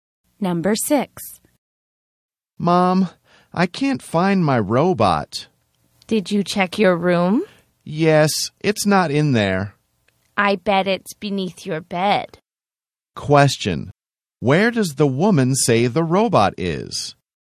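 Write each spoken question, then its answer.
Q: Where does the woman say the robot is?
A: Beneath the bed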